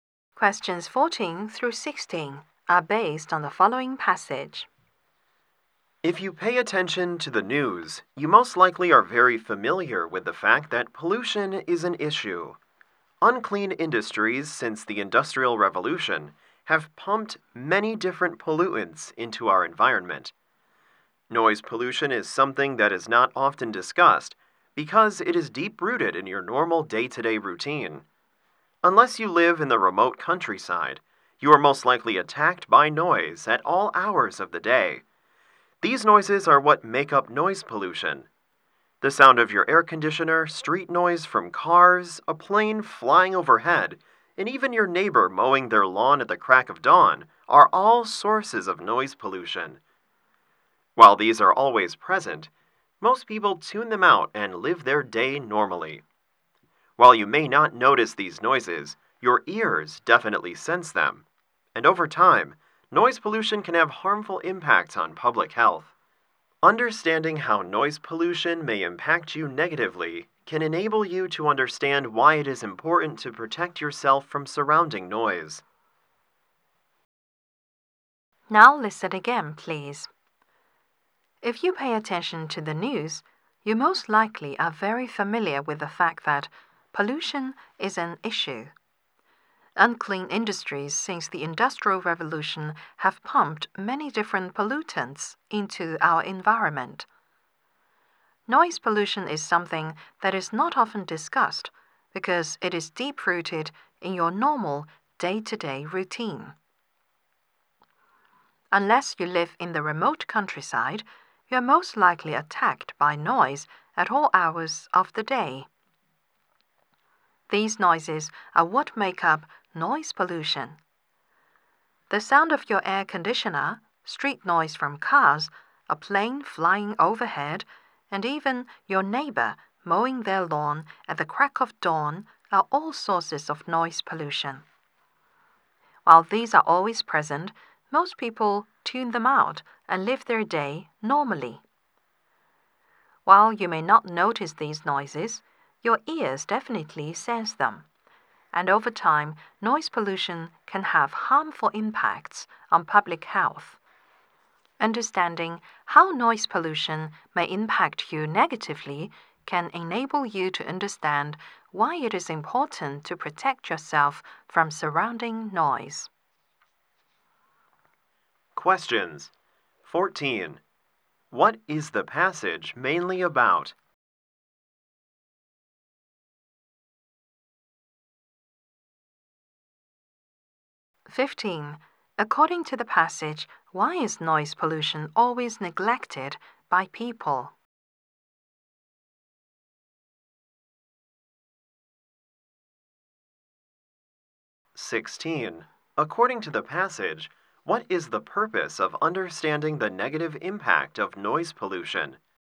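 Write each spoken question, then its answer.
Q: What is the passage mainly about?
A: Noise pollution

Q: According to the passage, why is noise pollution always neglected by people?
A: It is deep-rooted in people's daily routine

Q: According to the passage, what is the purpose of understanding the negative impact of noise pollution?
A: To understand why it is important to protect yourself from noise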